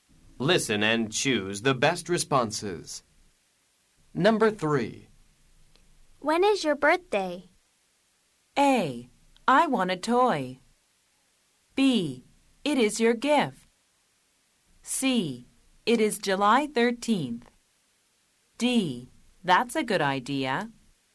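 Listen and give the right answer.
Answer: C: It is July 13th.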